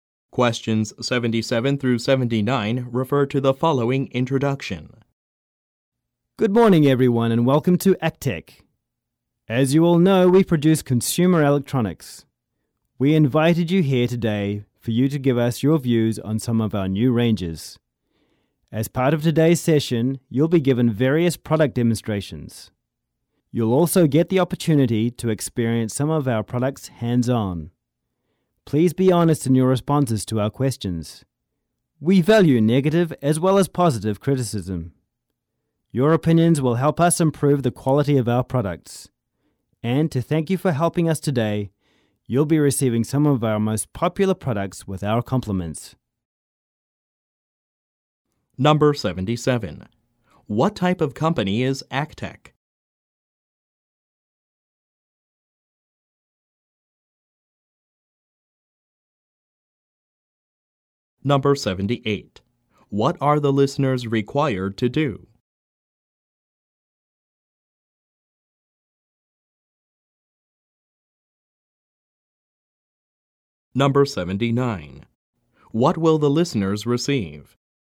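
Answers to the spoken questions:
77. A consumer electronics producer
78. Give their honest opinions on new products
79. Some of the company's most popular products, free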